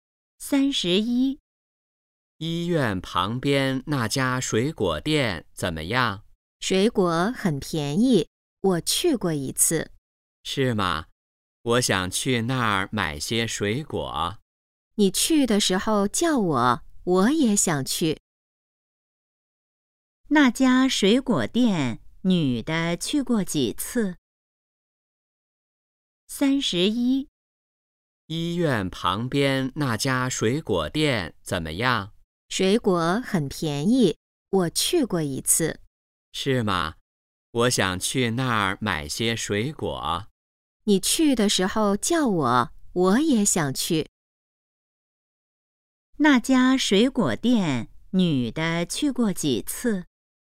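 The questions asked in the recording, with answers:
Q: 那家水果店,女的去过几次?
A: 一次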